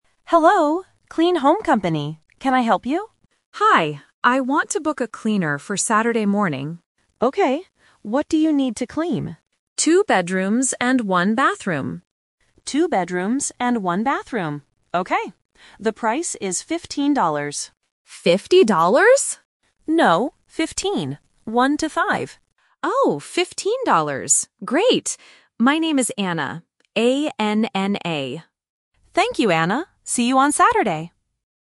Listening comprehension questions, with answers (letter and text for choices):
Listen to the conversation and choose the correct answer (A, B, or C).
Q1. When does the customer want the cleaner to come?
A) Saturday morning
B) Sunday morning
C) Friday afternoon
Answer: A) Saturday morning

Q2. How many bathrooms does the customer have?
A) One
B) Two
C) Three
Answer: A) One

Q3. What is the price of the cleaning service?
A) 50 dollars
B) 15 dollars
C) 5 dollars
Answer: B) 15 dollars

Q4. What word does the customer spell?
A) C-L-E-A-N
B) H-O-M-E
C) A-N-N-A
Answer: C) A-N-N-A

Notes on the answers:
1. The customer says, "I want to book a cleaner for Saturday morning."
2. The customer says "Two bedrooms and one bathroom." The operator repeats this to confirm.
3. The operator says the price is 15. When the customer mishears, the operator clarifies: "No, fifteen. 1-5."
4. The customer says her name is Anna and spells it: "A-N-N-A".